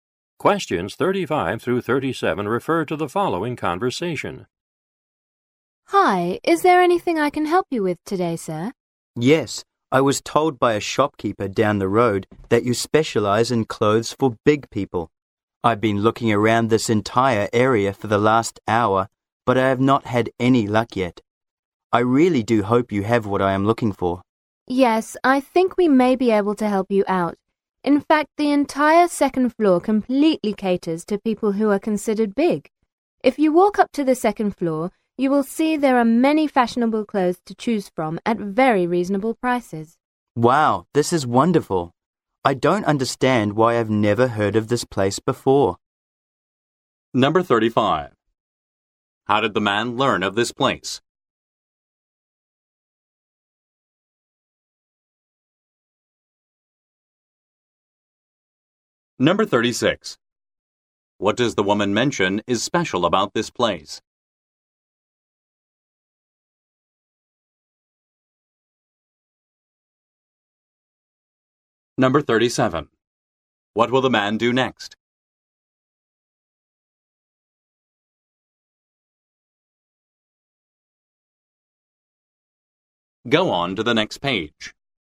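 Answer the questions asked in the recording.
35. A shopkeeper down the road told him
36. The whole second floor has clothes for big people
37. Go up to the second floor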